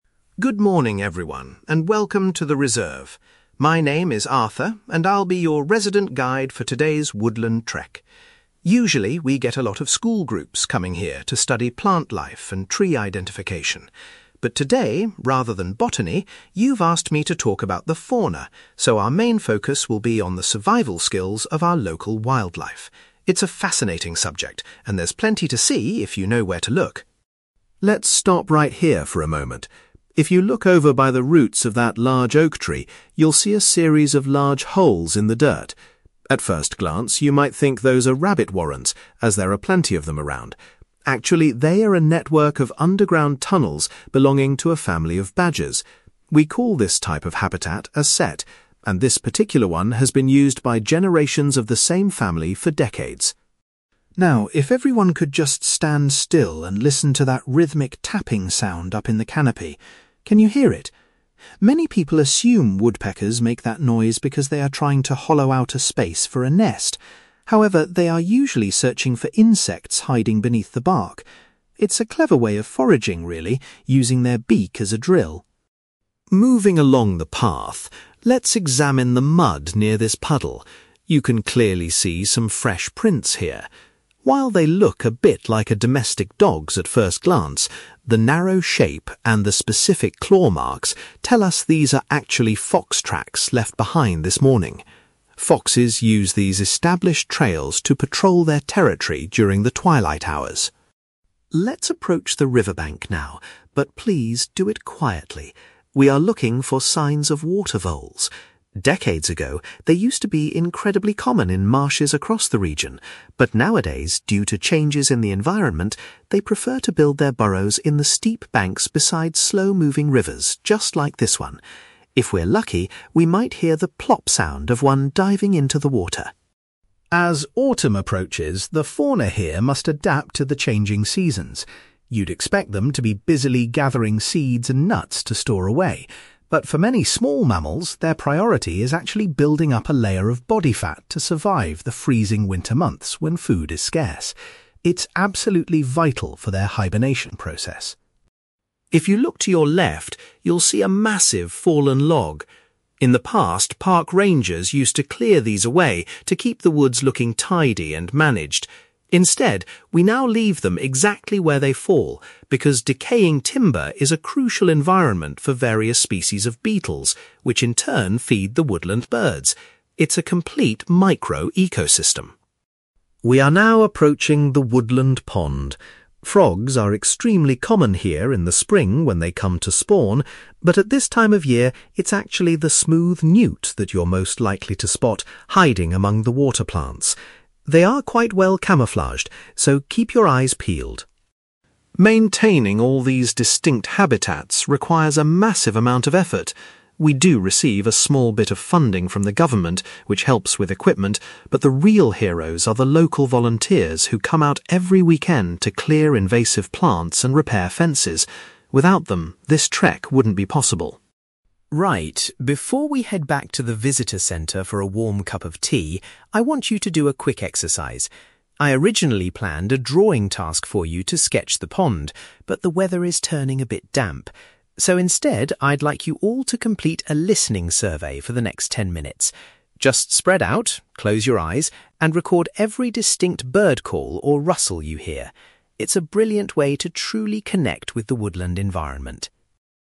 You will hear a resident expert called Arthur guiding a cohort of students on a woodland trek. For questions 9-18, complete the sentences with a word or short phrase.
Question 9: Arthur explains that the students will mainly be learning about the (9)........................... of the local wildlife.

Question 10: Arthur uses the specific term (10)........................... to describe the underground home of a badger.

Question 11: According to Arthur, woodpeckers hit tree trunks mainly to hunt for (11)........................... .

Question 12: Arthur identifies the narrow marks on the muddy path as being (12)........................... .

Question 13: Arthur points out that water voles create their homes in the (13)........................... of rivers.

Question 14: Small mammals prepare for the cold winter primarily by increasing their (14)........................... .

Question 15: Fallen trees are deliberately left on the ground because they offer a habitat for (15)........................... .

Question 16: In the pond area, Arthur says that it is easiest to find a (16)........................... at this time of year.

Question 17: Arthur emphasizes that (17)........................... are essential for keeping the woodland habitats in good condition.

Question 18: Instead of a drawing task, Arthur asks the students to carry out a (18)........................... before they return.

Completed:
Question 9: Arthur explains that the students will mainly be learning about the survival skills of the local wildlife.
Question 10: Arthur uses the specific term sett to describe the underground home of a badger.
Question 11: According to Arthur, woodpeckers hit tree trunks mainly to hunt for insects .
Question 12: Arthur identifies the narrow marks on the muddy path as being fox tracks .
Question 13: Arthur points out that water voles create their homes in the steep banks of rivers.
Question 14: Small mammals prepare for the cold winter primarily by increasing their body fat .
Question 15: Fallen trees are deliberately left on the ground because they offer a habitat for beetles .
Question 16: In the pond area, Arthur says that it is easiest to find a smooth newt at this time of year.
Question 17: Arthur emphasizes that local volunteers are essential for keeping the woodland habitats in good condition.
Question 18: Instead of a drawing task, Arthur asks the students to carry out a listening survey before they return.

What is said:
Arthur: Good morning, everyone, and welcome to the reserve. My name is Arthur, and I'll be your resident guide for today's woodland trek. Usually, we get a lot of school groups coming here to study plant life and tree identification. But today, rather than botany, you've asked me to talk about the fauna, so our main focus will be on the survival skills of our local wildlife. It's a fascinating subject, and there's plenty to see if you know where to look.
Let's stop right here for a moment. If you look over by the roots of that large oak tree, you'll see a series of large holes in the dirt. At first glance, you might think those are rabbit warrens, as there are plenty of them around. Actually, they are a network of underground tunnels belonging to a family of badgers. We call this type of habitat a sett, and this particular one has been used by generations of the same family for decades.
Now, if everyone could just stand still and listen to that rhythmic tapping sound up in the canopy. Can you hear it? Many people assume woodpeckers make that noise because they are trying to hollow out a space for a nest. However, they are usually searching for insects hiding beneath the bark. It's a clever way of foraging, really, using their beak as a drill.
Moving along the path, let's examine the mud near this puddle. You can clearly see some fresh prints here. While they look a bit like a domestic dog's at first glance, the narrow shape and the specific claw marks tell us these are actually fox tracks left behind this morning. Foxes use these established trails to patrol their territory during the twilight hours.
Let's approach the riverbank now, but please do it quietly. We are looking for signs of water voles. Decades ago, they used to be incredibly common in marshes across the region. But nowadays, due to changes in the environment, they prefer to build their burrows in the steep banks beside slow-moving rivers just like this one. If we're lucky, we might hear the 'plop' sound of one diving into the water.
As autumn approaches, the fauna here must adapt to the changing seasons. You'd expect them to be busily gathering seeds and nuts to store away. But for many small mammals, their priority is actually building up a layer of body fat to survive the freezing winter months when food is scarce. It's absolutely vital for their hibernation process.
If you look to your left, you'll see a massive fallen log. In the past, park rangers used to clear these away to keep the woods looking tidy and managed. Instead, we now leave them exactly where they fall because decaying timber is a crucial environment for various species of beetles, which in turn feed the woodland birds. It's a complete micro-ecosystem.
We are now approaching the woodland pond. Frogs are extremely common here in the spring when they come to spawn, but at this time of year, it's actually the smooth newt that you're most likely to spot hiding among the water plants. They are quite well camouflaged, so keep your eyes peeled.
Maintaining all these distinct habitats requires a massive amount of effort. We do receive a small bit of funding from the government, which helps with equipment, but the real heroes are the local volunteers who come out every weekend to clear invasive plants and repair fences. Without them, this trek wouldn't be possible.
Right, before we head back to the visitor centre for a warm cup of tea, I want you to do a quick exercise. I originally planned a drawing task for you to sketch the pond, but the weather is turning a bit damp. So, instead, I'd like you all to complete a listening survey for the next ten minutes. Just spread out, close your eyes, and record every distinct bird call or rustle you hear. It's a brilliant way to truly connect with the woodland environment.

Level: B2